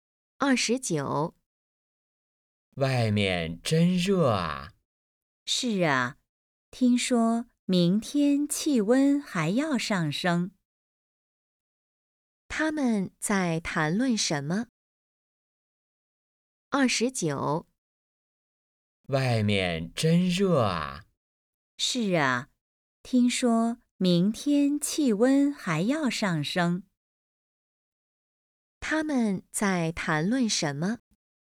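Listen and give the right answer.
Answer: 天气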